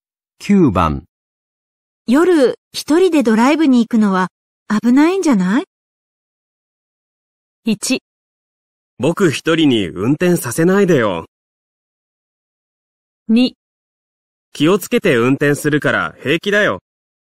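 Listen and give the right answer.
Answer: 2: 気をつけて運転するから平気だよ。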